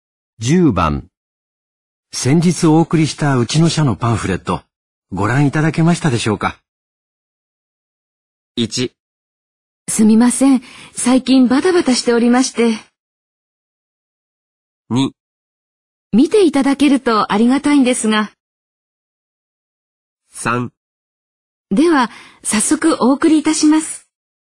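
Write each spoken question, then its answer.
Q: 先日お送りしたうちの社のパンフレット、ご覧いただけましたでしょうか。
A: 1: すみません。最近バタバタしておりまして。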